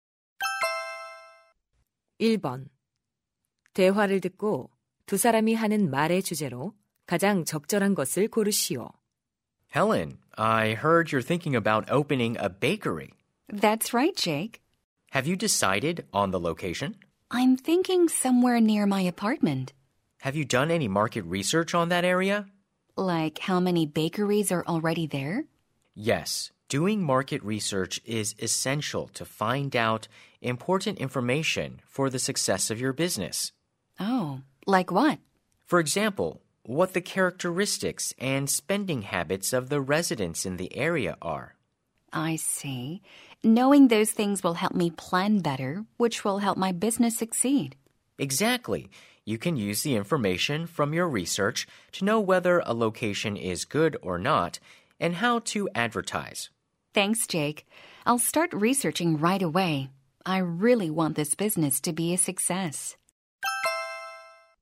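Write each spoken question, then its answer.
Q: 대화를 듣고 두 사람이 하는 말의 주제로 가장 적절한 것을 고르시오.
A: 사업 성공을 위한 시장 조사의 중요성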